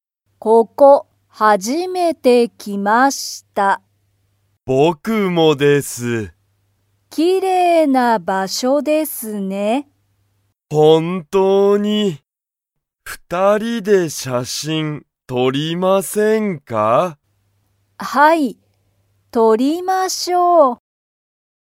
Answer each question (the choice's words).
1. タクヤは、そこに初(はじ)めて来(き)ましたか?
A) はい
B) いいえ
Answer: はい

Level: Level 1